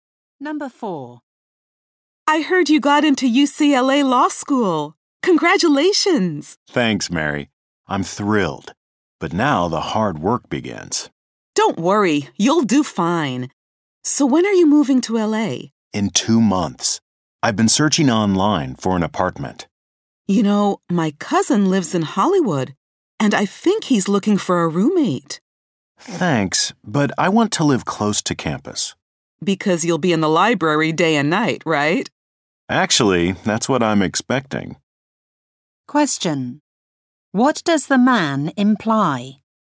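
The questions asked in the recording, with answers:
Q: What does the man imply?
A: He expects to study in the library all the time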